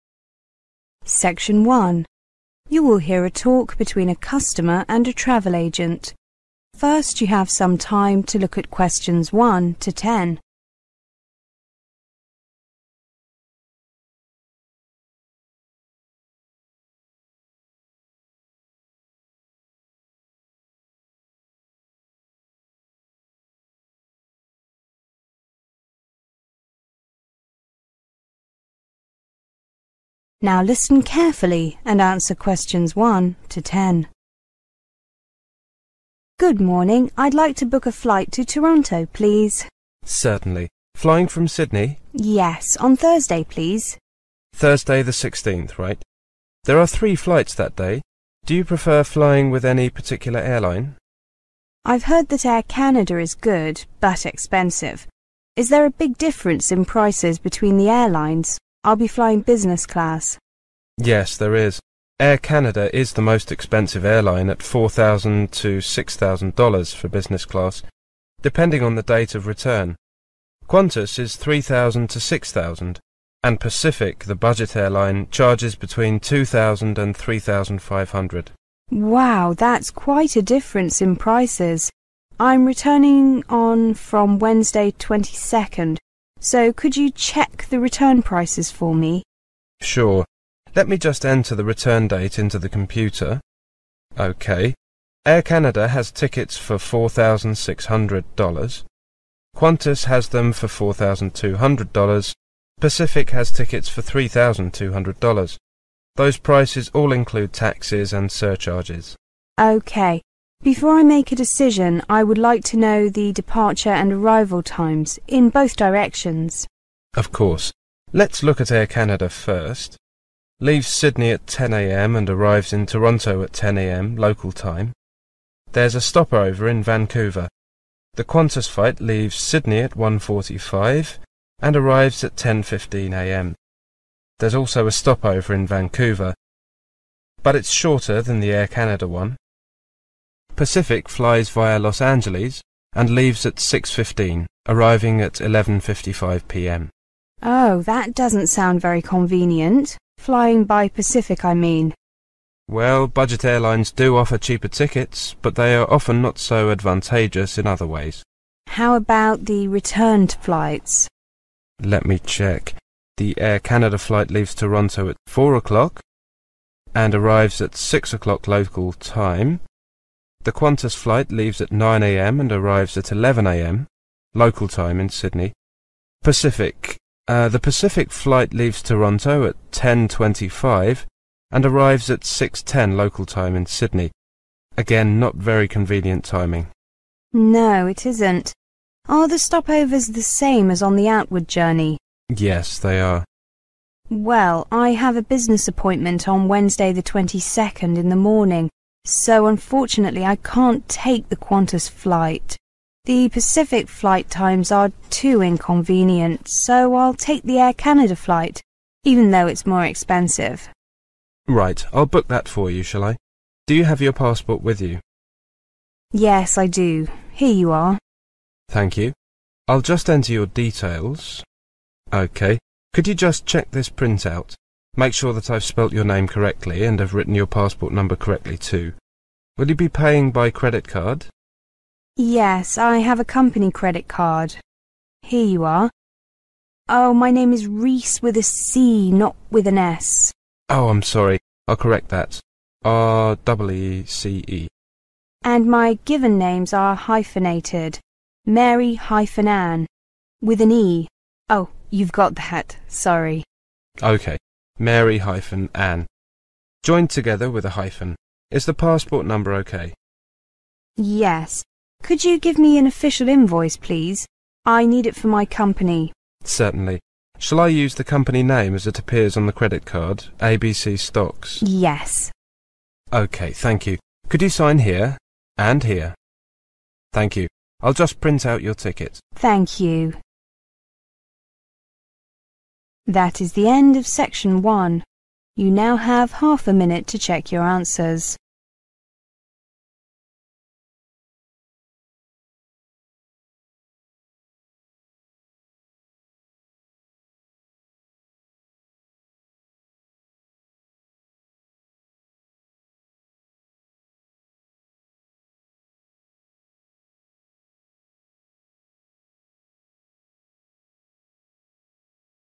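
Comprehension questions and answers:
Answer the following questions using NO MORE THAN THREE WORDS AND/ OR A NUMBER for each answer.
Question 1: On which day and date does the woman want to fly to Toronto?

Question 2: What class does the woman want to fly in?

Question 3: What is the lowest price for a ticket on the days the customer has chosen?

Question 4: What do the ticket prices include?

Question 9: What is the customer's full name?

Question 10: Which company does she work for?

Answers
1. Thursday the 16th
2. business class
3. $3,200
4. taxes and surcharges
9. Mary-Anne Reece
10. ABC Stocks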